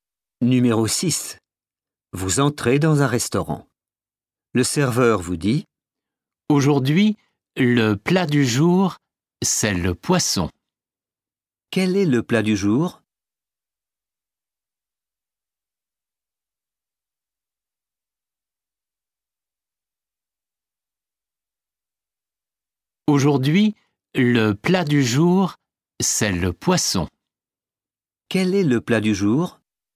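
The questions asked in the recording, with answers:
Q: Quel est le plat du jour?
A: le poisson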